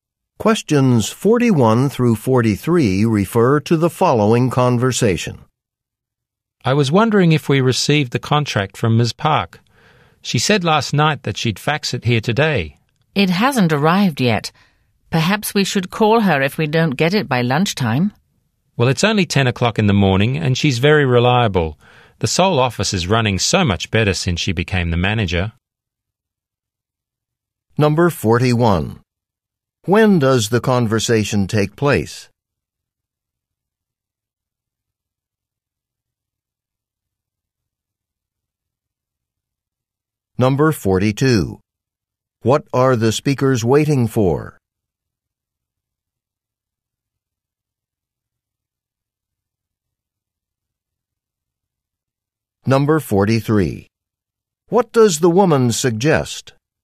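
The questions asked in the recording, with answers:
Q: When does the conversation take place?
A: In the morning, at about 10 o'clock

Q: What are the speakers waiting for?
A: A contract from Ms. Park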